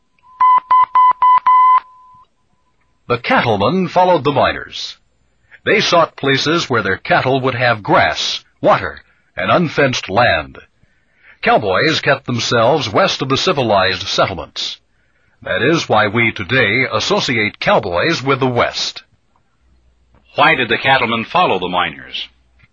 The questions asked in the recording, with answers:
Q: Why did the cattlemen follow the miners?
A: Because they wanted grass, water, and unfenced land.